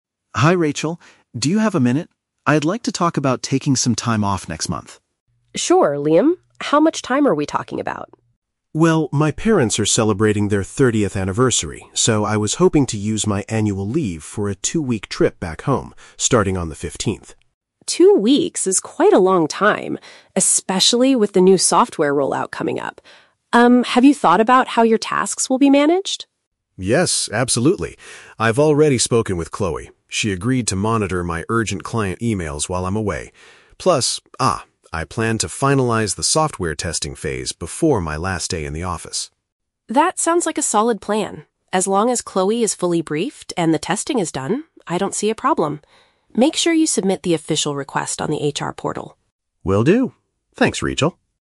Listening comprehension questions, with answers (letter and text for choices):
Listen to the conversation between an employee and his manager, then choose the correct answer (A, B, or C).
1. Why does Liam want to take a two-week break next month?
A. To assist his team with a new software rollout.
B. To celebrate a significant family milestone.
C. To travel abroad for an international business meeting.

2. How will Liam ensure his work is handled during his absence?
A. A colleague will respond to his critical messages.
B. He will continue testing the software while traveling.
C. He will hire a temporary assistant to do his job.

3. What does Rachel instruct Liam to do at the end of the conversation?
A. Submit his software testing report to the HR department.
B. Give Chloe a small gift for taking over his workload.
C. Process his formal leave application through the company's system.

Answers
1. B. To celebrate a significant family milestone.
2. A. A colleague will respond to his critical messages.
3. C. Process his formal leave application through the company's system.

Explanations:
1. Liam says he wants to take a trip because his parents are "celebrating their thirtieth anniversary." Option B paraphrases this as a "significant family milestone."

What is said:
Liam: Hi Rachel, do you have a minute? I'd like to talk about taking some time off next month.
Rachel: Sure, Liam. How much time are we talking about?
Liam: Well, my parents are celebrating their thirtieth anniversary, so I was hoping to use my annual leave for a two-week trip back home, starting on the fifteenth.
Rachel: Two weeks is quite a long time, especially with the new software rollout coming up. Um, have you thought about how your tasks will be managed?
Liam: Yes, absolutely. I've already spoken with Chloe. She agreed to monitor my urgent client emails while I'm away. Plus, ah, I plan to finalize the software testing phase before my last day in the office.
Rachel: That sounds like a solid plan. As long as Chloe is fully briefed and the testing is done, I don't see a problem. Make sure you submit the official request on the HR portal.
Liam: Will do. Thanks, Rachel!